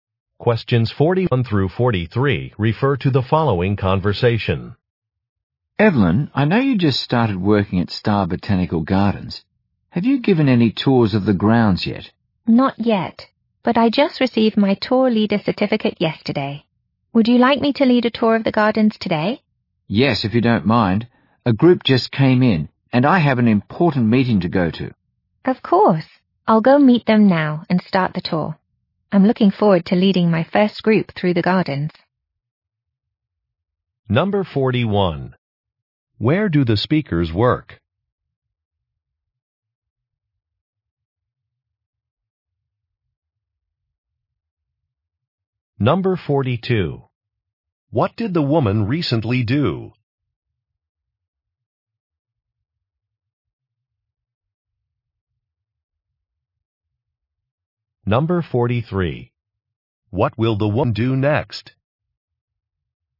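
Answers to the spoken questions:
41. At a botanical garden
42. Received a tour leader certificate
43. Lead a tour of the gardens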